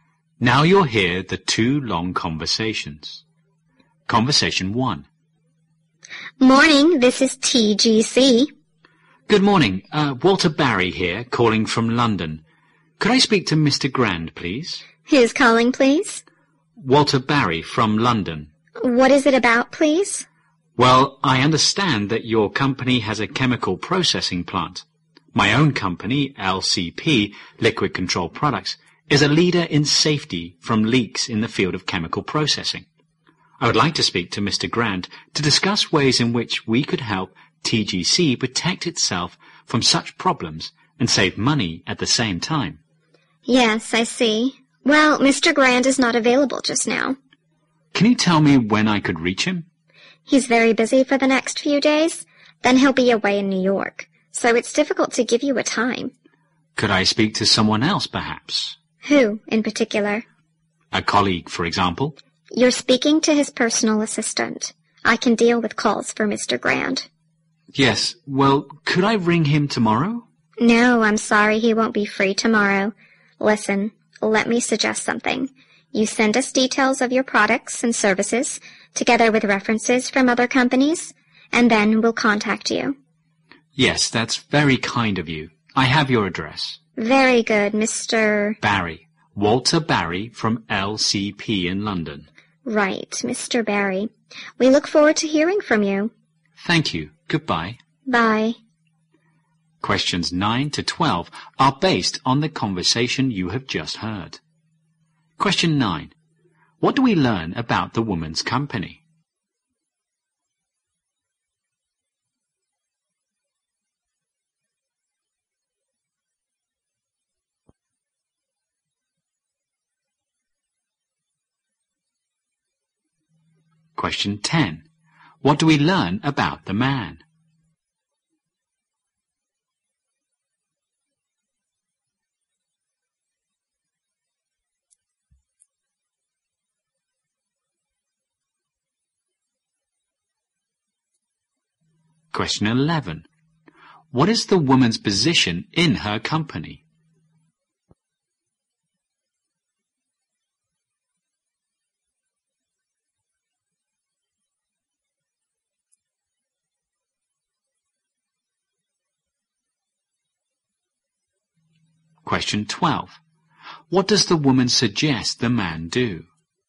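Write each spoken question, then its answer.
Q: What do we learn about the woman's company?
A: It has a chemical processing plant.

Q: What do we learn about the man?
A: He works for a company that prevents chemical leaks.

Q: What is the woman's position in her company?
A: Personal assistant to Mr. Grant.

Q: What does the woman suggest the man do?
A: Send details of his products and services with references.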